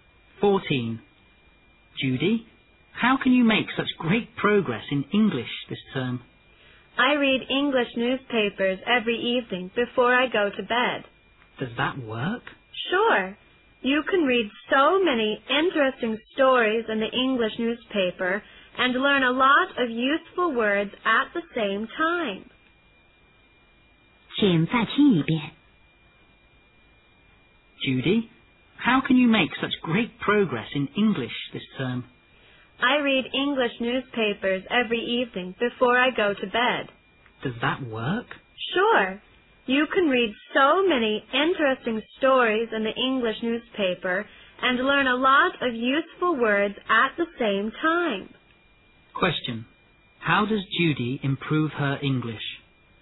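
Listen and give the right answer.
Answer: By reading English newspapers every evening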